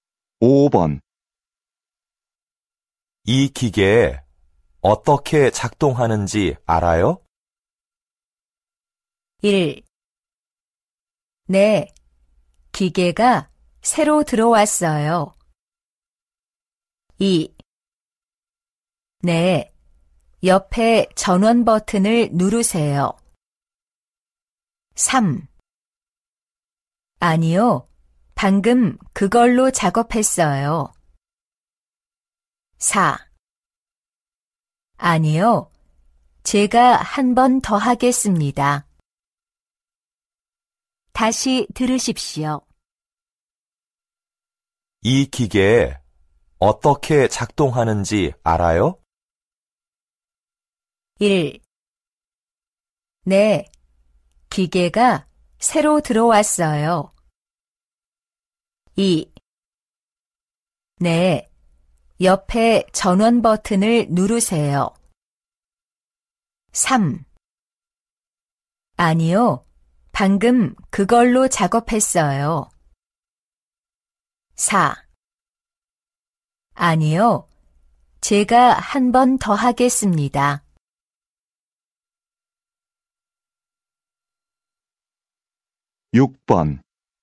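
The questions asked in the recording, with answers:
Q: 이 기계 어떻게 작동하는지 알아요?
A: 2: 네, 옆에 전원 버튼을 누르세요.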